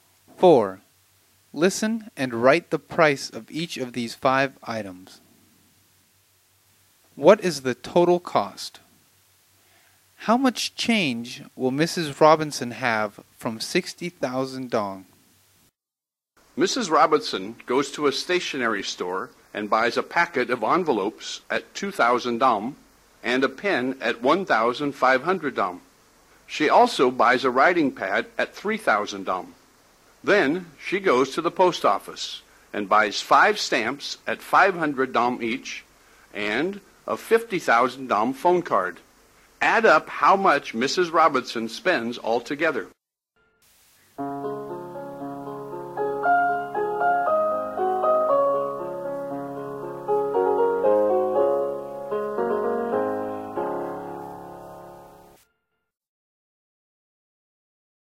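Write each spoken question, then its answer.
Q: What is the total cost?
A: 59,000 dong

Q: How much change will Mrs. Robinson have from 60,000 dong?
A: 1,000 dong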